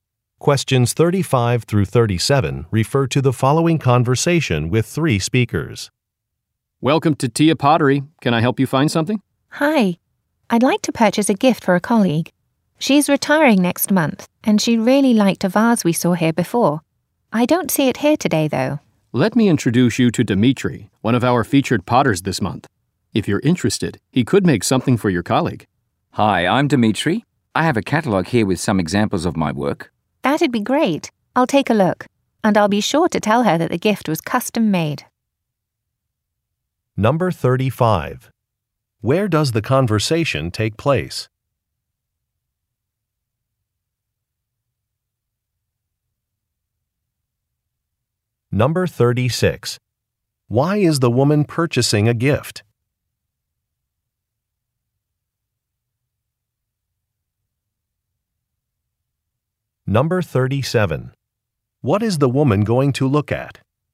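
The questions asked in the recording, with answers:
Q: Where does the conversation take place?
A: At a pottery shop

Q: Why is the woman purchasing a gift?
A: A colleague is retiring

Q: What is the woman going to look at?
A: A catalog of the potter's work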